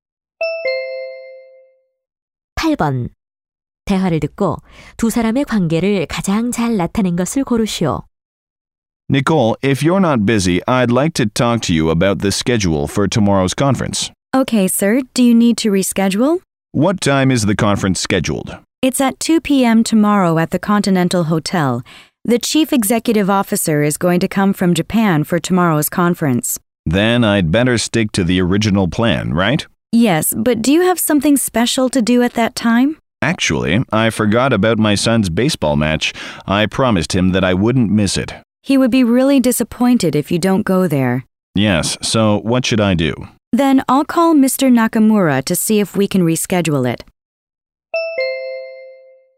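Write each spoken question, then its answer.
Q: 대화를 듣고 두 사람의 관계를 가장 잘 나타낸 것을 고르시오.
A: 상사와 비서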